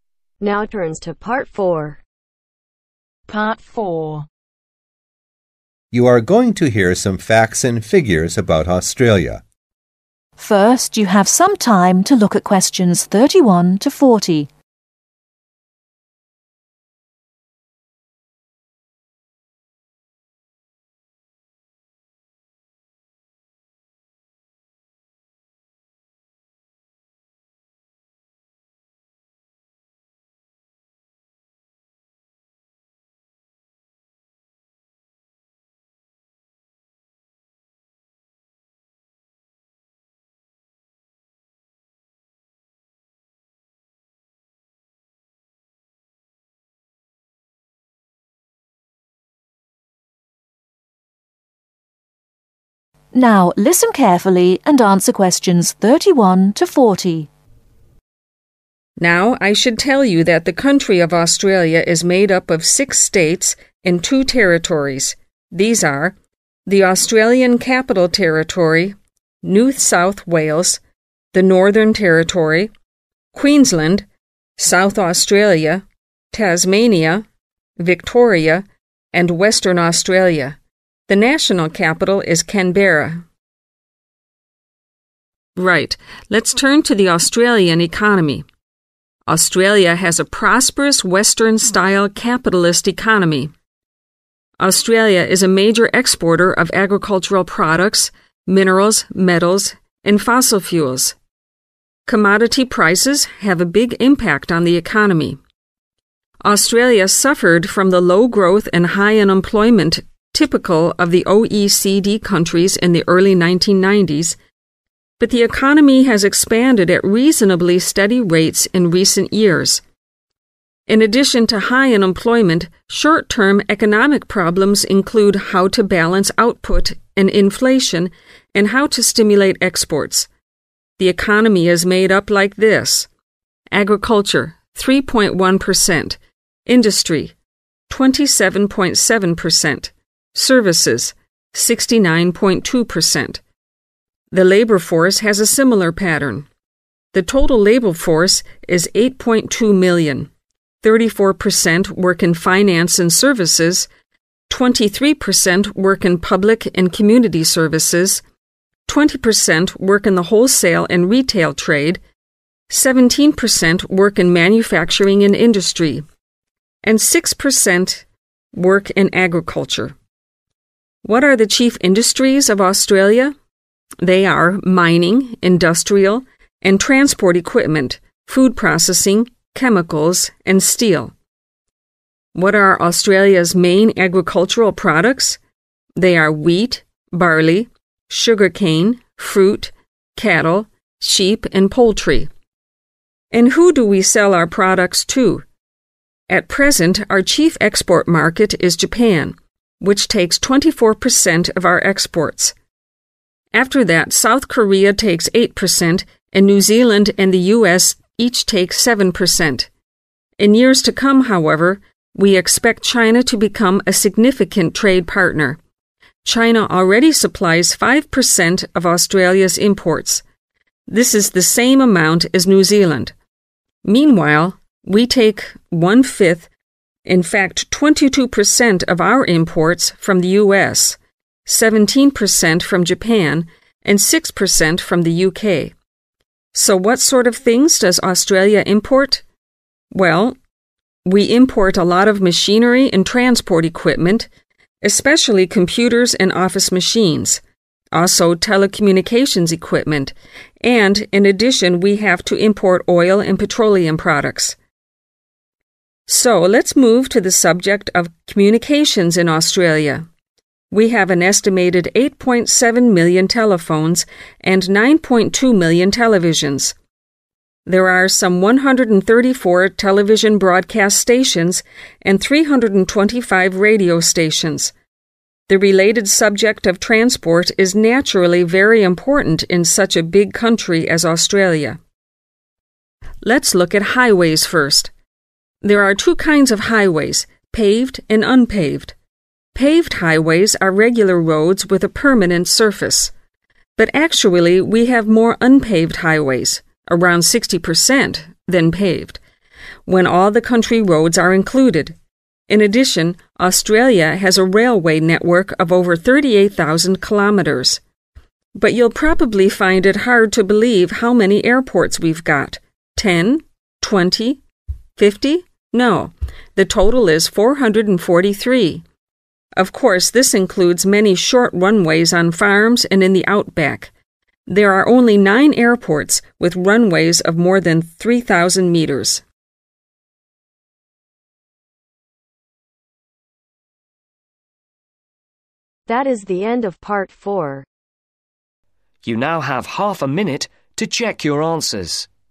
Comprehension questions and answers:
Complete the information below. Write ONE WORD ONLY for each answer.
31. Australia has a prosperous (31)............ style capitalist economy.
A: Western

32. Australia is a major exporter of (32)............ products, minerals, metals, and fossil fuels.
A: Agricultural

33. Economic problems include how to balance output and (33)............ and how to stimulate (34)............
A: Inflation

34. Economic problems include how to balance output and (33)............ and how to stimulate (34)............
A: Exports

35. The chief industries of Australia are mining, industrial and (35)............ equipment food processing, chemicals and steel.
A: Transport

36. Australia's main agricultural products are wheat, (36)............ sugarcane, fruit, cattle, sheep and (37)............ .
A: Barley

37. Australia's main agricultural products are wheat, (36)............ sugarcane, fruit, cattle, sheep and (37)............ .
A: Poultry

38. The chief export market is (38)............ .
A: Japan

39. The chief source of imports is the (39)............ .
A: US

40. Communications and transport are very important in such a (40)............ country as Australia.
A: Big